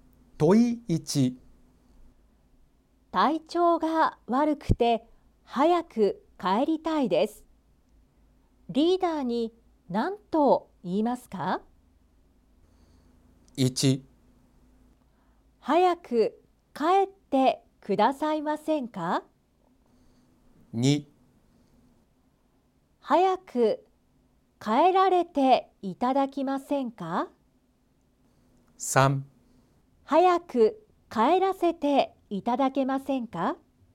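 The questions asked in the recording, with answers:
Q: 体調が悪くて早く帰りたいです。リーダーに何と言いますか?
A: 3: 早く帰らせていただけませんか?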